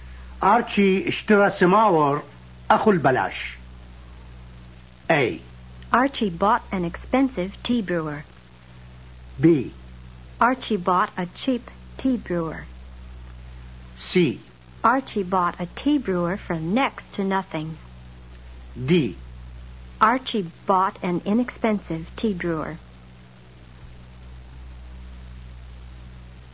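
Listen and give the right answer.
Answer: C: Archie bought a tea brewer for next to nothing.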